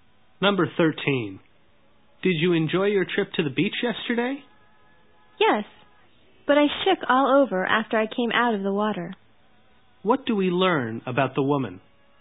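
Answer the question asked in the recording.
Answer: She felt very cold after coming out of the water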